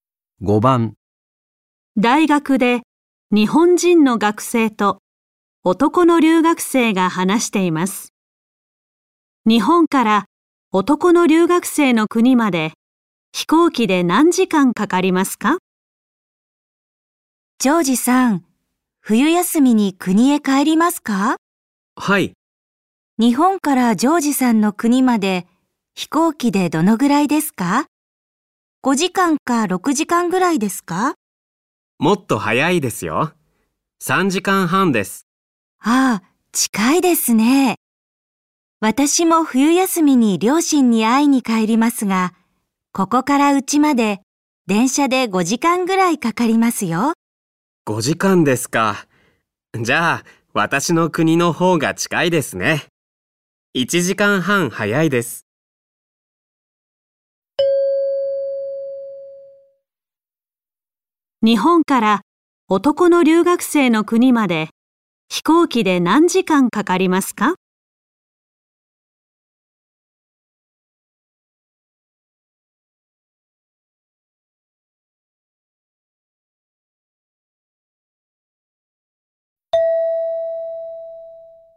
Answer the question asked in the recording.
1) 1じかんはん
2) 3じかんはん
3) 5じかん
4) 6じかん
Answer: 2) 3じかんはん

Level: N5 Listening · Test 1